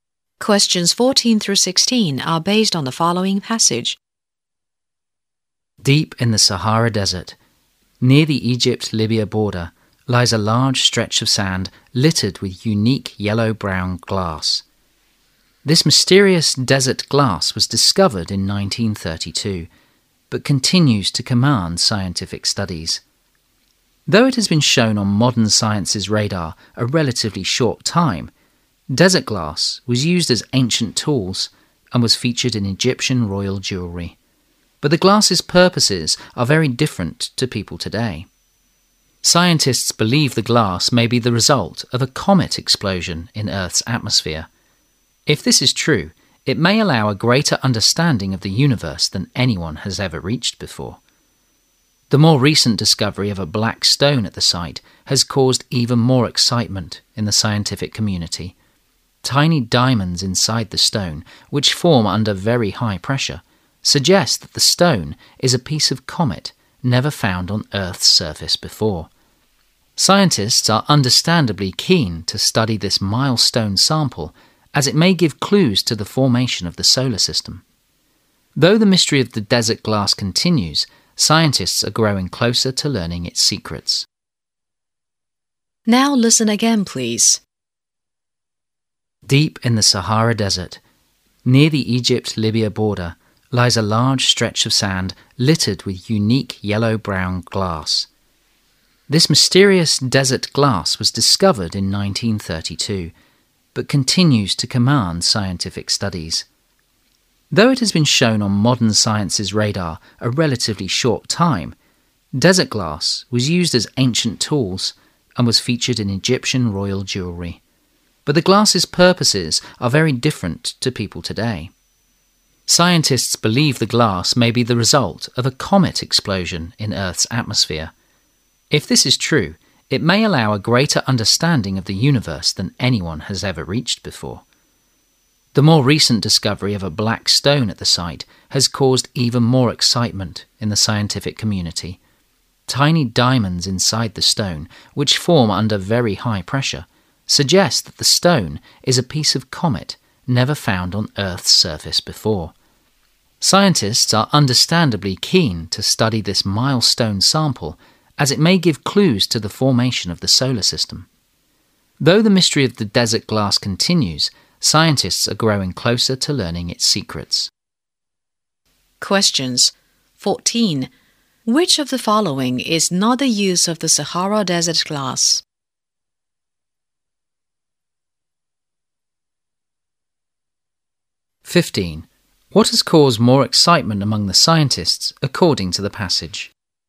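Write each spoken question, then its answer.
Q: What has caused more excitement among the scientists, according to the passage?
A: The discovery of a black stone at the site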